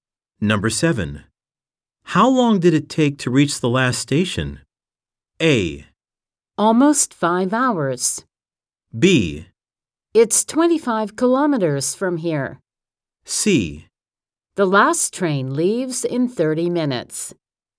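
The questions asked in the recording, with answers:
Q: How long did it take to reach the last station?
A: A: Almost 5 hours.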